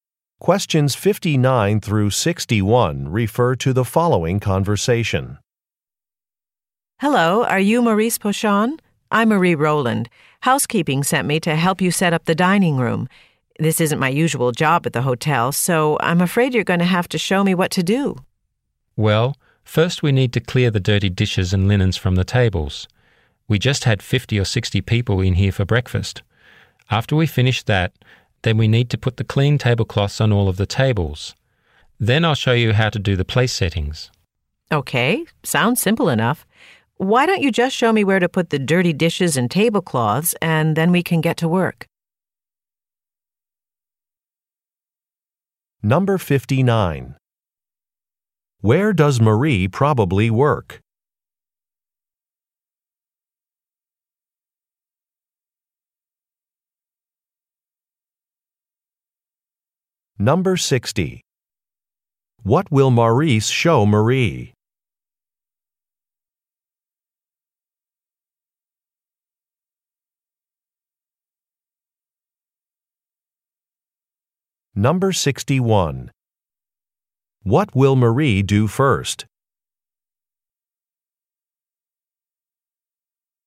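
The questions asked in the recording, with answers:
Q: Where does Marie probably work?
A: At a hotel

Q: What will Maurice show Marie?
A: How to do the place settings

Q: What will Marie do first?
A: Clear dirty dishes and linens from the tables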